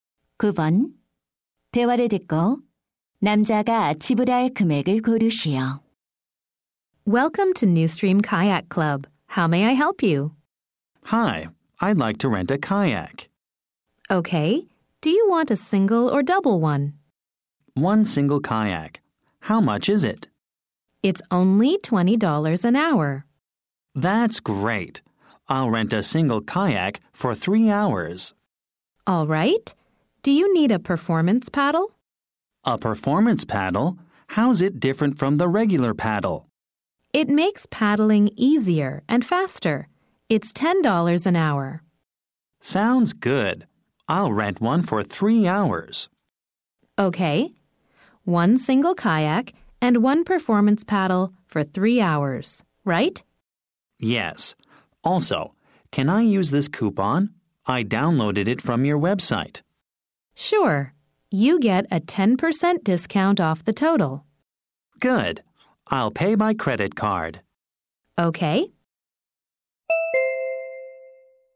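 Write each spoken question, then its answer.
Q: 대화를 듣고 남자가 지불할 금액을 고르시오.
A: $81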